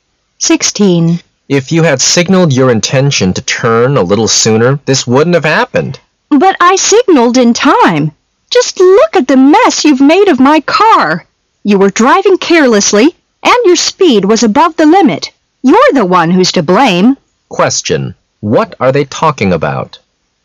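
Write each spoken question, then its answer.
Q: What are they talking about?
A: A car accident.

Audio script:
[解析] M: If you had signaled your intention to turn a little sooner, this wouldn't have happened! W: But I signaled in time! Just look at the mess you've made of my car! You were driving carelessly and your speed was above the limit! You're the one who's to blame! Q: What are they talking about?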